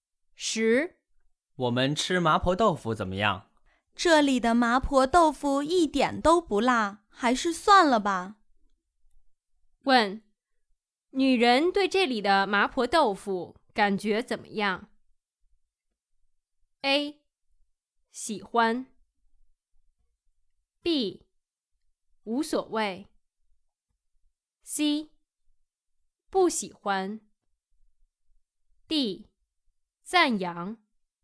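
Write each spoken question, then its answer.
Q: 问,女人对这里的麻婆豆腐感觉怎么样? A. 喜欢。 B. 无所谓。 C. 不喜欢。 D.赞扬。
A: C: 不喜欢。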